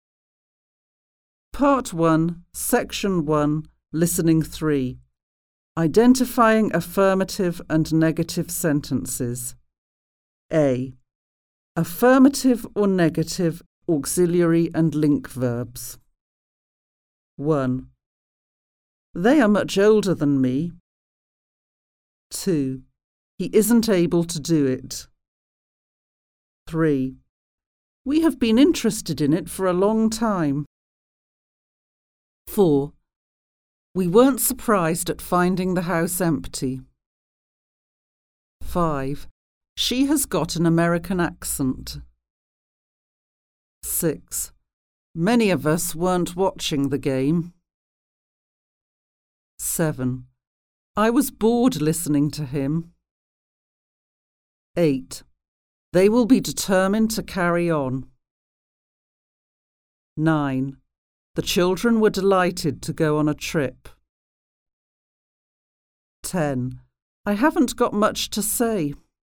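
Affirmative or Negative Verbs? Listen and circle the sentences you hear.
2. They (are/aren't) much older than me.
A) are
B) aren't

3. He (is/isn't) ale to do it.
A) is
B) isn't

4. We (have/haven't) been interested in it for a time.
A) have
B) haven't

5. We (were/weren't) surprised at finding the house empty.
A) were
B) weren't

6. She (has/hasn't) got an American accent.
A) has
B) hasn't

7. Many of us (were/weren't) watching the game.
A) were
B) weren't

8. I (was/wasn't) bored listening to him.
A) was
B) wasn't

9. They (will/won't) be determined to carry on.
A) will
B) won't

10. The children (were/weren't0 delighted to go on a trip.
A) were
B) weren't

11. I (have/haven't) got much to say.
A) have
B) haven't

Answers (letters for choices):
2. A
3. B
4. A
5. B
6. A
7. B
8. A
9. A
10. A
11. B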